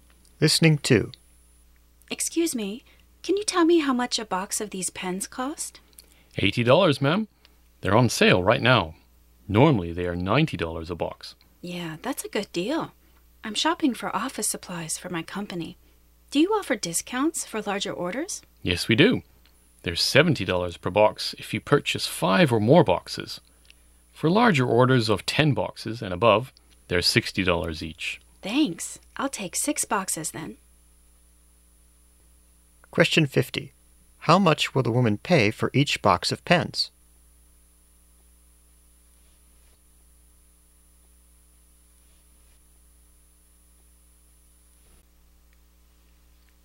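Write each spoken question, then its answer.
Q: How much will the woman pay for each box of pens?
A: $70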